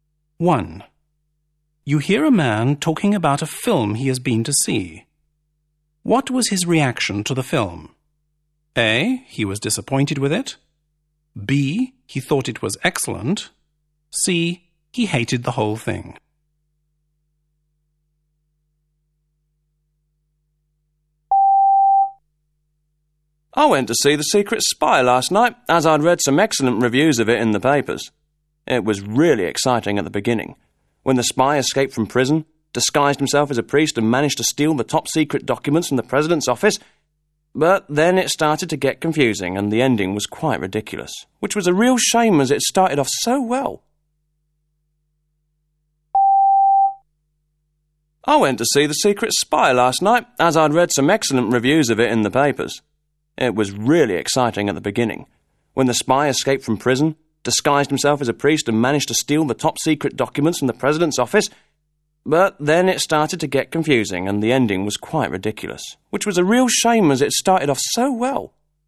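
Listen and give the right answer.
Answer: A: He was disappointed with it.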